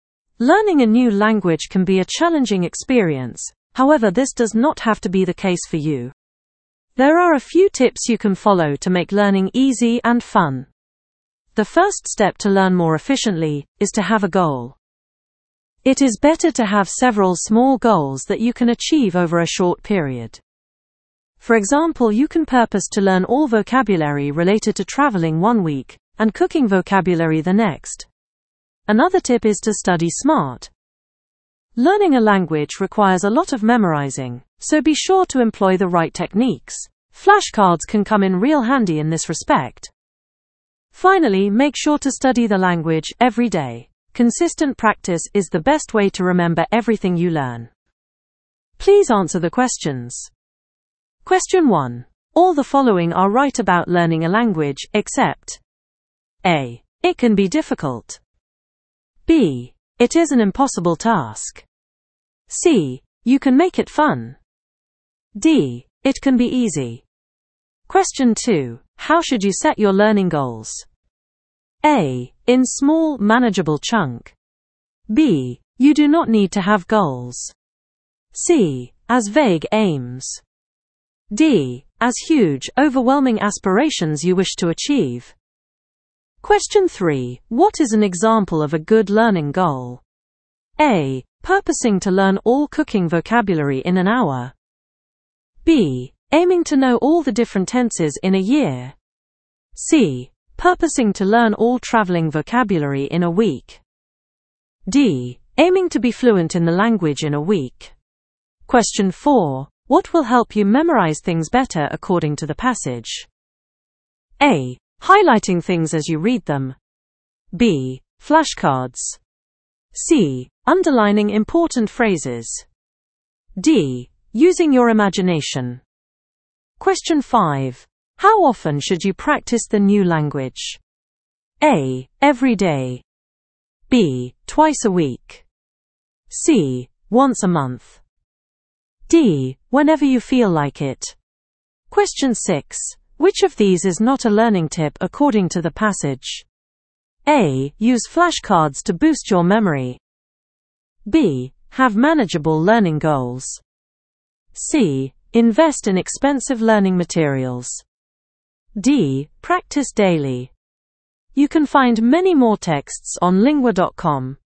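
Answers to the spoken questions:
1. B: It is an impossible task.
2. A: In small, manageable chunk.
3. C: Purposing to learn all traveling vocabulary in a week.
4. B: Flashcards.
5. A: Every day.
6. C: Invest in expensive learning materials.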